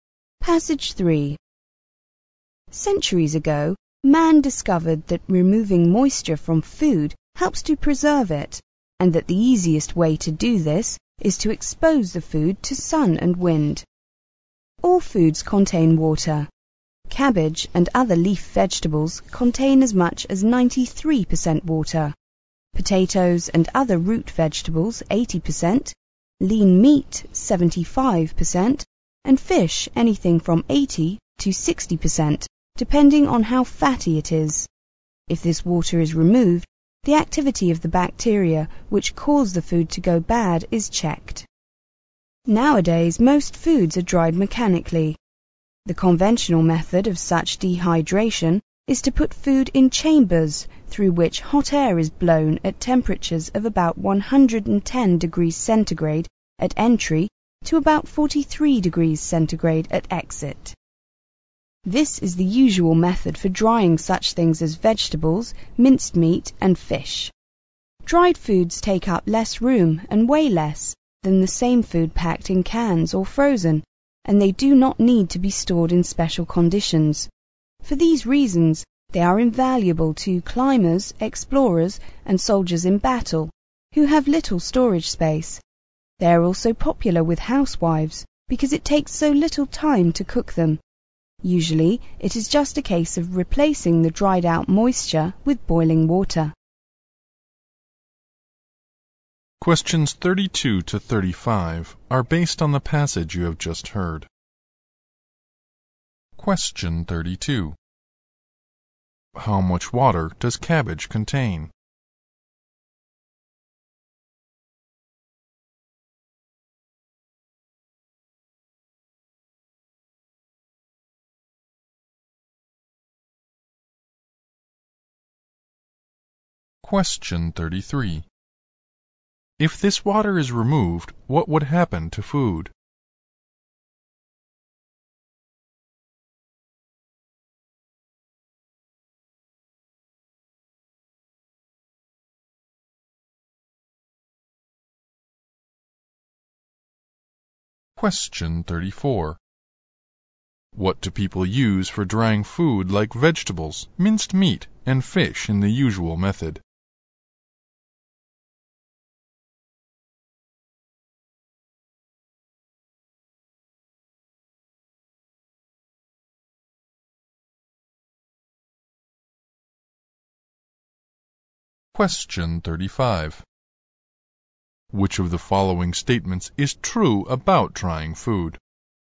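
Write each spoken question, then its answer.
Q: How much water does cabbage contain?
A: As much as 93%

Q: If this water is removed, what would happen to food?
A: The bacteria that make it go bad are checked, so it keeps

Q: What do people use for drying food like vegetables, minced meat, and fish in the usual method?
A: Chambers with hot air blown through them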